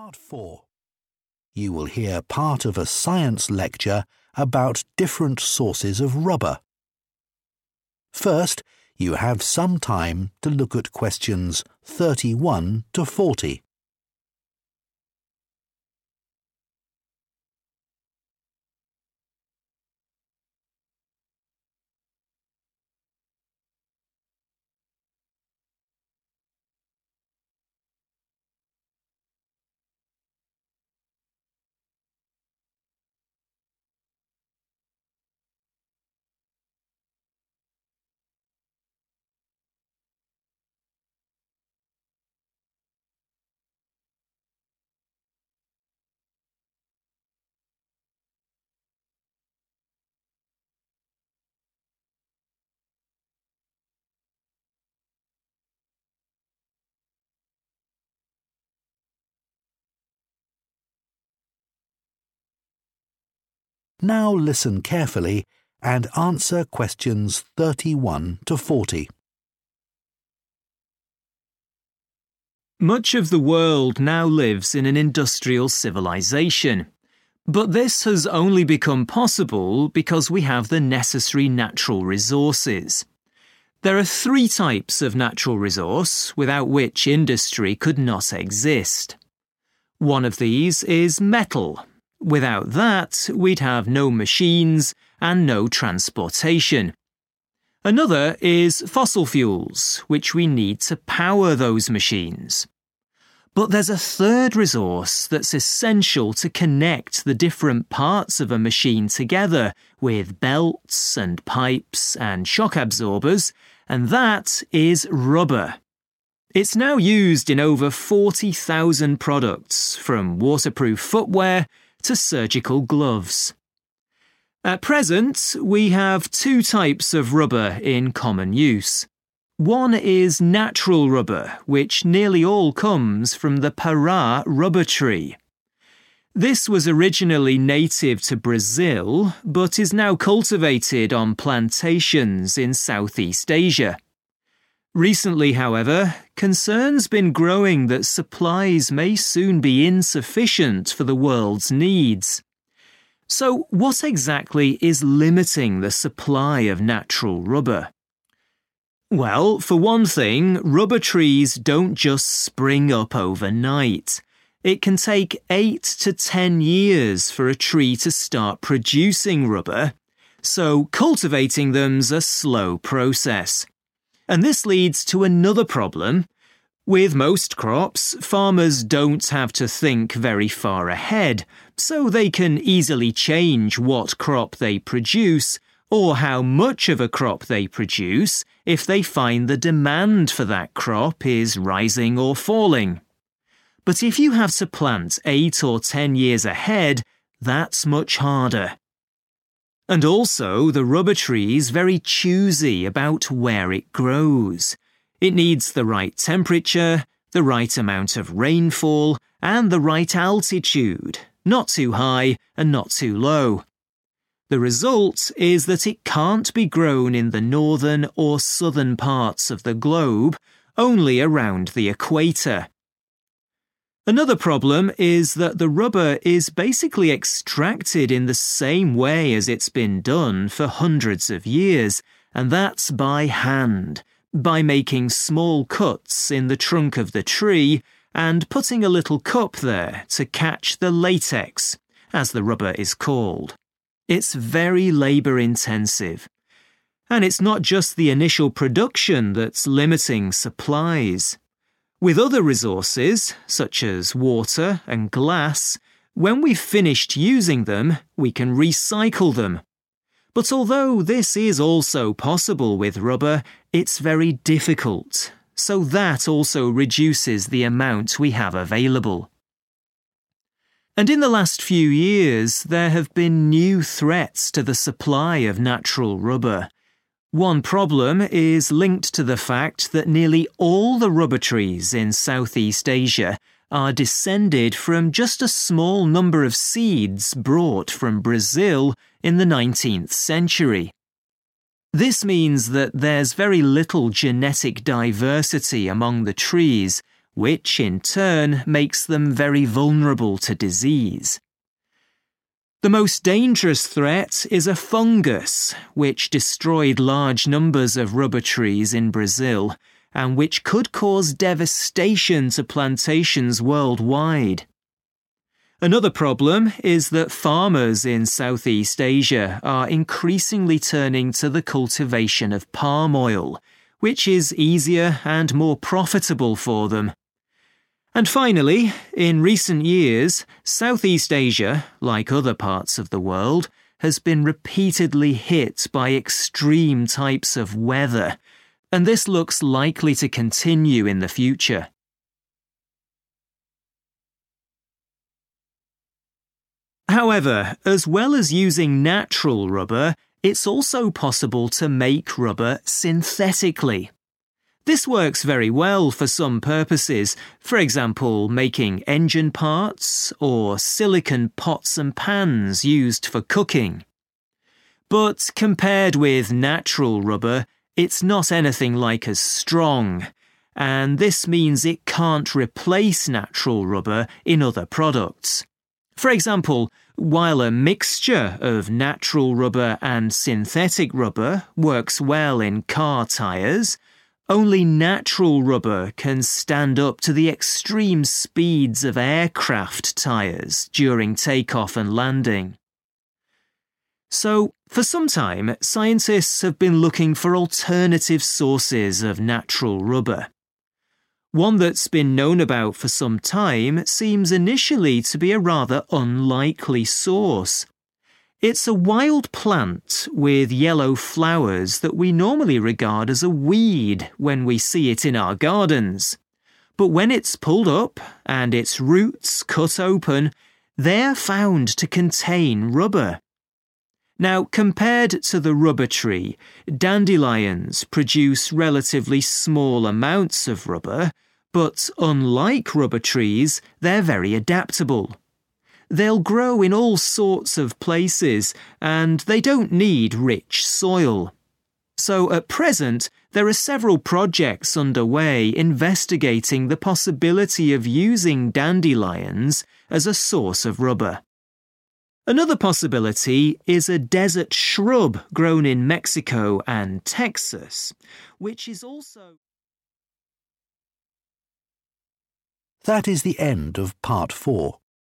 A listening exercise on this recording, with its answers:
Complete the notes below. Write ONE WORD ONLY for each answer.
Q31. Three resources which are essential for industrial civilisation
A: metals / metal

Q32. the growth of the tree is _____ .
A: slow

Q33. production cannot easily be adjusted because of increasing or decreasing _____ .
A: demand

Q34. the tree only grows near the _____ .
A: equator

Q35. it is very difficult to _____ rubber after production.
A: recycle

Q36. lack of genetic diversity, leading to danger of disease caused by a _____ .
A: fungus

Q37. extreme _____ events.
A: weather

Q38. is less _____ than natural rubber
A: strong

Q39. A wild flower (a type of dandelion) has rubber in its _____ .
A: roots

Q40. It can be grown in many locations and does not require good _____ .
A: soil

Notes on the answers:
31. The correct answer is metal because the speaker lists three specific natural resources that an industrial society must have to function. These three essential materials are metal, fossil fuels, and rubber. In the notes, fossil fuels and rubber are already written, so metal is the missing item needed to complete the list of three.
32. The correct answer is correct because the speaker explains that rubber trees do not grow quickly. It takes a long time—eight to ten years—before a tree is ready to produce rubber. Therefore, the speaker describes the act of growing (cultivating) these trees as a 'slow' process.
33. The correct answer is "demand" because the speaker identifies a challenge in the rubber industry: farmers find it difficult to change their production levels in response to how many people want to buy the product. Unlike other crops where farmers can quickly increase or decrease supply when the need (demand) changes, rubber trees take up to ten years to grow, making it hard to adjust production when the market's need for rubber goes up or down.
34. The correct answer is 'equator' because the transcript explains that rubber trees are very specific about where they can live. They need specific temperatures and rain that are only found in the middle part of the world. Because they cannot grow in the north or south, their growth is limited to the area around this specific middle line.
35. The correct answer is "recycle" because the speaker discusses how some materials can be easily reused, but rubber is not one of them. The speaker mentions that while we can reuse things like water and glass, doing the same with rubber is very hard (difficult). This difficulty in reusing old rubber helps explain why there is not enough natural rubber to meet the world's needs.
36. The correct answer is 'fungus' because the transcript identifies it as the biggest danger to rubber trees. Since the trees in South-East Asia are very similar to each other, they can all easily get sick or be destroyed by this specific type of organism.
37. The correct answer is 'weather' because the speaker lists it as one of the recent problems for the supply of natural rubber. The transcript mentions that some parts of the world have been experiencing 'extreme types of weather,' which acts as a threat to rubber production. These unusual or strong weather events create difficulties for farming and supply.
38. The correct answer is "strong" because the transcript compares man-made (synthetic) rubber to rubber that comes from trees (natural rubber). It explains that synthetic rubber is "not anything like as strong." In this context, "not anything like as" is a way to say "much less," so synthetic rubber is much less strong than natural rubber. This makes it unsuitable for things that need to be very tough, like tires for planes.
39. The correct answer is "roots" because the speaker discusses dandelions as an alternative source of natural rubber. The transcript specifically mentions that rubber is found when the roots of these plants are cut open. This indicates that the rubber is stored within that specific part of the plant.
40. The correct answer is 'soil' because the text explains that dandelions are very adaptable. Unlike some other plants that need specific conditions, dandelions can grow in many places and do not need 'rich soil' (which is another way of saying 'good soil') to survive.

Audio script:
Much of the world now lives in an industrial civilisation. But this has only become possible because we have the necessary natural resources. There are three types of natural resource without which industry could not exist. One of these is metal - without that we'd have no machines and no transportation. Another is fossil fuels, which we need to power those machines. But there's a third resource that's essential to connect the different parts of a machine together with belts and pipes and shock absorbers, and that is rubber. It's now used in over 40,000 products, from waterproof footwear to surgical gloves.
At present, we have two types of rubber in common use. One is natural rubber, which nearly all comes from the Pará rubber tree. This was originally native to Brazil, but is now cultivated on plantations in South-East Asia. Recently, however, concern's been growing that supplies may soon be insufficient for the world's needs. So what exactly is limiting the supply of natural rubber?
Well, for one thing, rubber trees don't just spring up overnight. It can take eight to ten years for a tree to start producing rubber, so cultivating them's a slow process. And this leads to another problem. With most crops, farmers don't have to think very far ahead, so they can easily change what crop they produce, or how much of a crop they produce, if they find the demand for that crop is rising or falling. But if you have to plant eight or ten years ahead, that's much harder. And also the rubber tree's very choosy about where it grows. It needs the right temperature, the right amount of rainfall, and the right altitude - not too high and not too low. The result is that it can't be grown in the northern or southern parts of the globe, only around the equator. Another problem is that the rubber is basically extracted in the same way as it's been done for hundreds of years, and that's by hand, by making small cuts in the trunk of the tree, and putting a little cup there to catch the latex, as the rubber is called. It's very labour-intensive. And it's not just the initial production that's limiting supplies. With other resources such as water and glass, when we've finished using them we can recycle them, but although this is also possible with rubber, it's very difficult, so that also reduces the amount we have available.
And in the last few years, there have been new threats to the supply of natural rubber. One problem is linked to the fact that nearly all the rubber trees in South-East Asia are descended from just a small number of seeds brought from Brazil in the nineteenth century. This means that there's very little genetic diversity among the trees, which in turn makes them very vulnerable to disease. The most dangerous threat is a fungus, which destroyed large numbers of rubber trees in Brazil, and which could cause devastation to plantations worldwide. Another problem is that farmers in South-East Asia are increasingly turning to the cultivation of palm oil, which is easier and more profitable for them. And finally, in recent years South-East Asia, like other parts of the world, has been repeatedly hit by extreme types of weather, and this looks likely to continue in the future.
However, as well as using natural rubber, it's also possible to make rubber synthetically. This works very well for some purposes, for example, making engine parts, or silicone pots and pans used for cooking. But compared with natural rubber, it's not anything like as strong, and this means it can't replace natural rubber in other products. For example, while a mixture of natural rubber and synthetic rubber works well in car tyres, only natural rubber can stand up to the extreme speeds of aircraft tyres during take-off and landing.
So for some time, scientists have been looking for alternative sources of natural rubber. One that's been known about for some time seems initially to be a rather unlikely source. It's a wild plant with yellow flowers that we normally regard as a weed when we see it in our gardens. But when it's pulled up and its roots cut open, they're found to contain rubber.
Now, compared to the rubber tree, dandelions produce relatively small amounts of rubber, but unlike rubber trees, they're very adaptable. They'll grow in all sorts of places, and they don't need rich soil. So at present there are several projects underway investigating the possibility of using dandelions as a source of rubber.
Another possibility is a desert shrub grown in Mexico and Texas ...